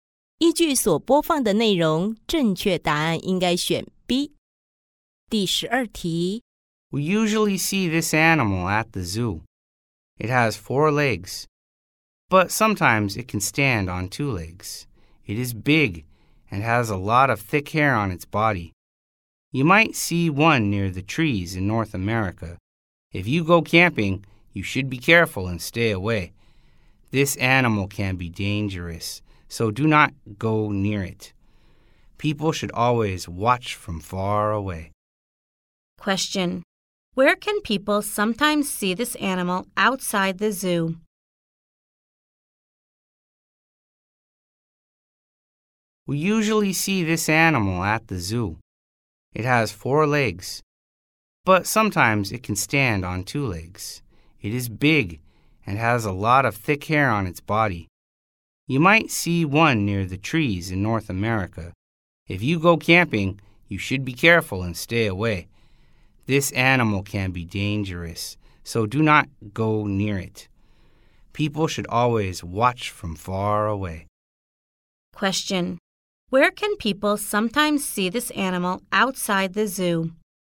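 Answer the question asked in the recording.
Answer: Near the trees in North America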